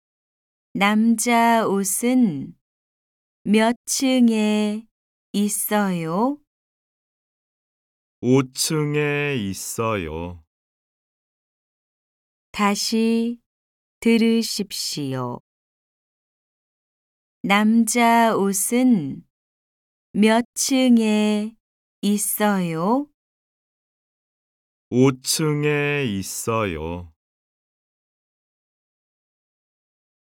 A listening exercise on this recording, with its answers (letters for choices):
CÂU 4. Địa điểm này là đâu? Hãy chọn một địa điểm thích hợp:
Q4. Địa điểm này là đâu? Hãy chọn một địa điểm thích hợp:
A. 호텔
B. 꽃집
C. 백화점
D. 사무실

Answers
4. C